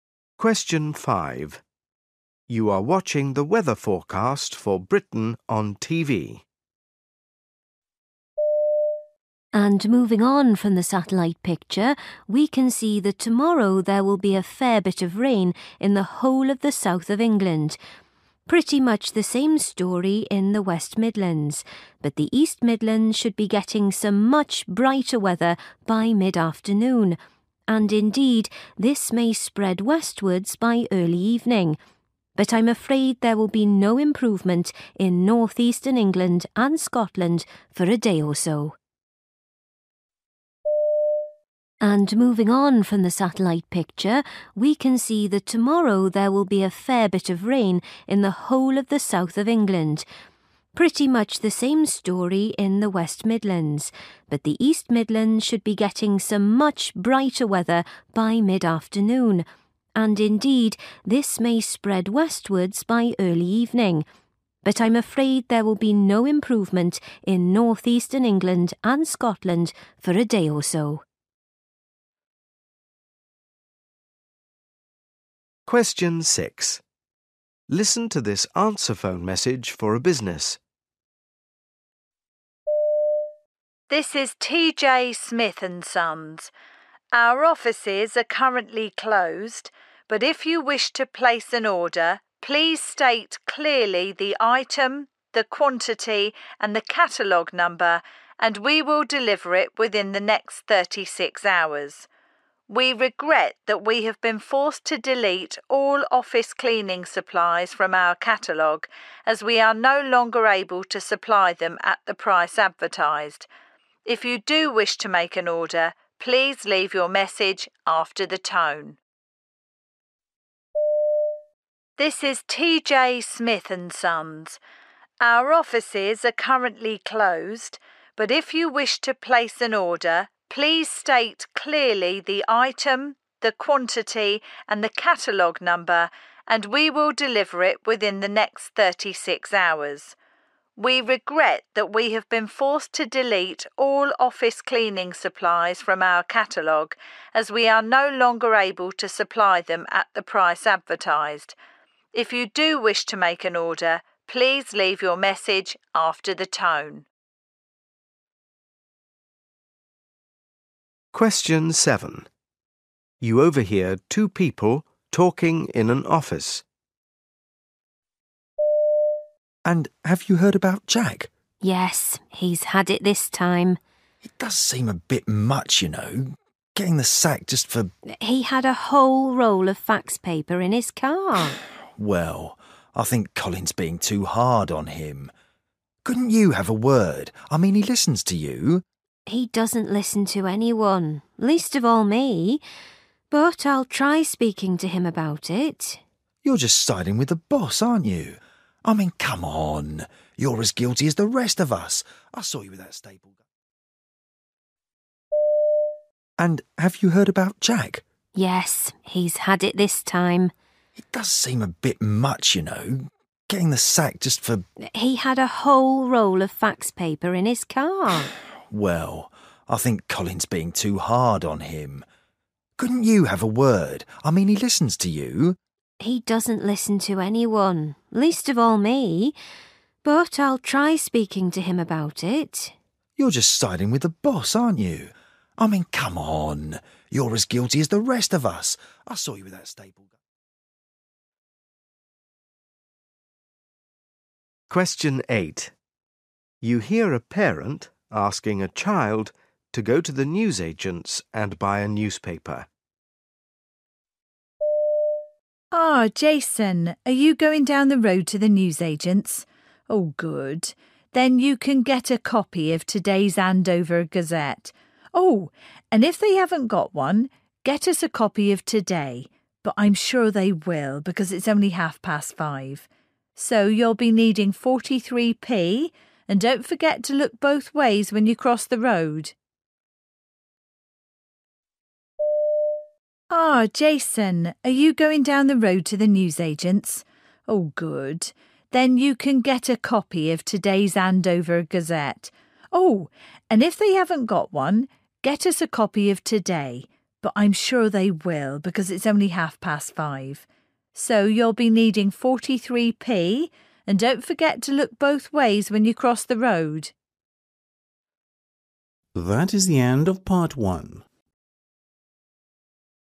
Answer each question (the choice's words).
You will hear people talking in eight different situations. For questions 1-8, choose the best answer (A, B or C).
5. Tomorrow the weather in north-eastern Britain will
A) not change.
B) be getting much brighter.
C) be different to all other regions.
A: not change.

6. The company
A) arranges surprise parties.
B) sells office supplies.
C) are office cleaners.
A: sells office supplies.

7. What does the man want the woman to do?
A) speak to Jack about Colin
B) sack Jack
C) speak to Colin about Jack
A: speak to Colin about Jack

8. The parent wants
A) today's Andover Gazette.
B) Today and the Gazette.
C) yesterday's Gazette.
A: today's Andover Gazette.

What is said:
I put all the shampoo and things into smaller bottles, but ... maybe it's the golf clubs ... they weigh quite a bit. Could I possibly take them as hand luggage?
W: I'm sorry, sir, but I don't think they'll fit in the overhead lockers.
M: Well, I guess I'll just have to pay excess baggage then. How much is it please?
5 You are watching the weather forecast for Britain on TV.
and moving on from the satellite picture we can see that tomorrow there will be a fair bit of rain in the whole of the south of England. Pretty much the same story in the west Midlands but the east Midlands should be getting some much brighter weather by mid-afternoon and indeed this may spread westwards by early evening. But I'm afraid there will be no improvement in north-eastern England and Scotland for a day or so.
6 Listen to this answerphone message for a business.
Smith and Sons. Our offices are currently closed but if you wish to place an order, please state clearly the item, the quantity and the catalogue number and we will deliver it within the next thirty-six hours. We regret that we have been forced to delete all office cleaning supplies from our catalogue as we are no longer able to supply them at the price advertised. If you do wish to make an order, please leave your message after the tone.
7 You overhear two people talking in an office.
M: And, have you heard about Jack?
W: Yes, he's had it this time.
M: It does seem a bit much you know, getting the sack, just for...
W: He had a whole roll of fax paper in his car.
M: Well, I think Colin's being too hard on him. Couldn't you have a word? I mean, he listens to you.
W: He doesn't listen to anyone – least of all me. But I'll try speaking to him about it.
M: You're just siding with the boss, aren't you? I mean, come on, you're as guilty as the rest of us. I saw you with that ...
8 You hear a parent asking a child to go to the newsagent's and buy a newspaper.
Ah, Jason, are you going down the road to the newsagent's? Oh, good. Then you can get a copy of today's 'Andover Gazette'. Oh, and if they haven't got one, get us a copy of 'Today', but I'm sure they will because it's only half past five. and don't forget to look both ways when you cross the road.